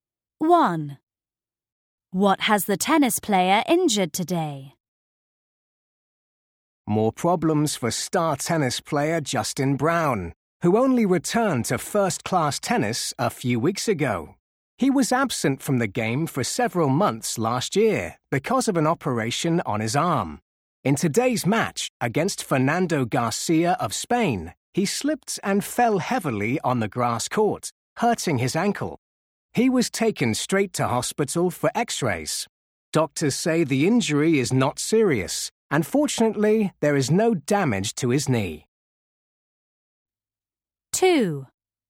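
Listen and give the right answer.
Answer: His ankle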